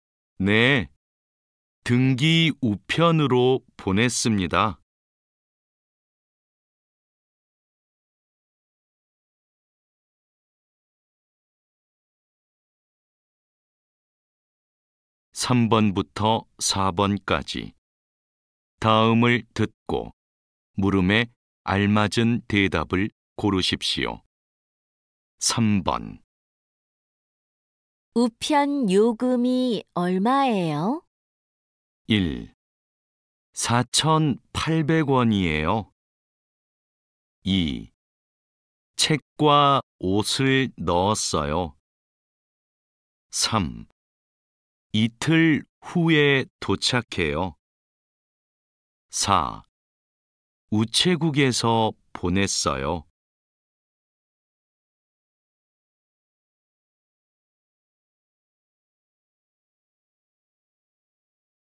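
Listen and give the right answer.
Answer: 1: 4,800원이에요.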